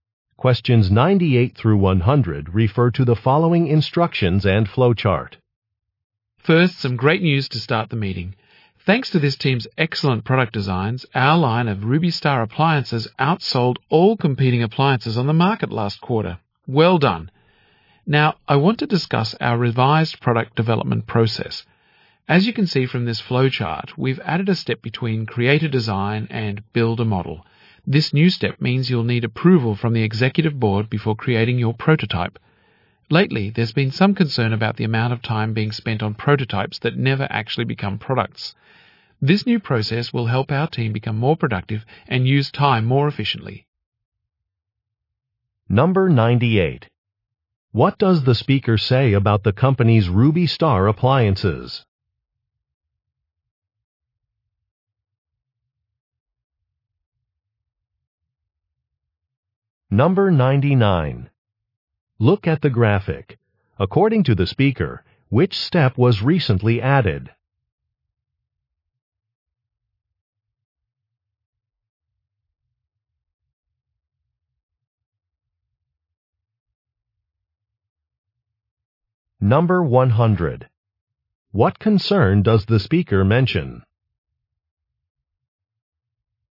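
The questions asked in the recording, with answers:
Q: What does the speaker say about the company's Ruby Star appliances?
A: They outsold competing appliances last quarter

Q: What concern does the speaker mention?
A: Time spent on prototypes that never become products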